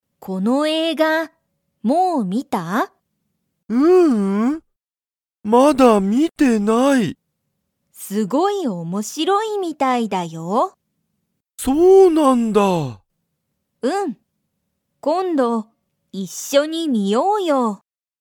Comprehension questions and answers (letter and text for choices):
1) ユウヤは、もうその映画えいがを観みましたか?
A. はい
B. いいえ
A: B. いいえ

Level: Level 1